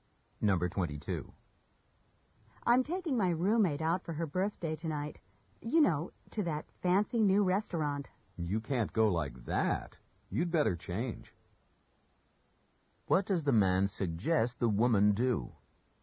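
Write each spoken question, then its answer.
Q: What does the man suggest the woman do?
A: Change her clothes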